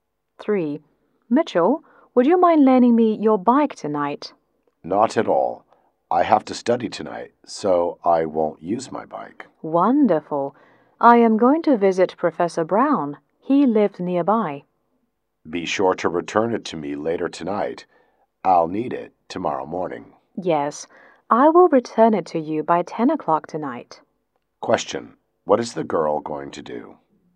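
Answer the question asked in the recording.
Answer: Visit Professor Brown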